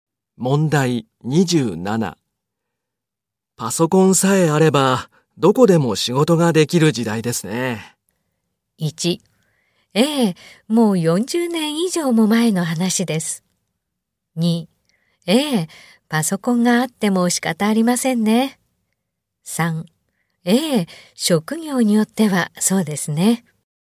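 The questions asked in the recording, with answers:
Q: パソコンさえあれば、どこでも仕事ができる時代ですね。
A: 3: ええ、職業によってはそうですね。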